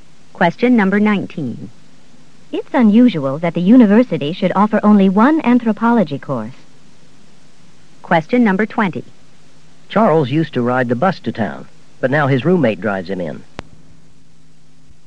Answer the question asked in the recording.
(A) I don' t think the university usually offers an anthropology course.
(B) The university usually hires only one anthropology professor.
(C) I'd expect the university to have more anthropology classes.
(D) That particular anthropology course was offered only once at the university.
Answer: (C) I'd expect the university to have more anthropology classes.

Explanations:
It's unusual that the university should offer only one anthropology course.

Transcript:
19. It's unusual that the university should offer only one anthropology course.